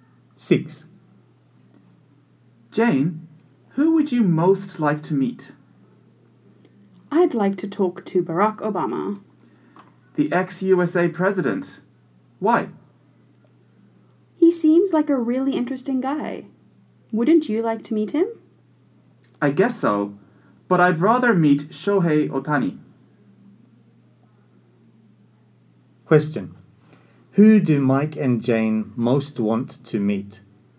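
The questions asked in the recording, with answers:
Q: Who do Mike and Jane most want to meet?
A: Jane wants to meet Barack Obama, and Mike wants to meet Shohei Ohtani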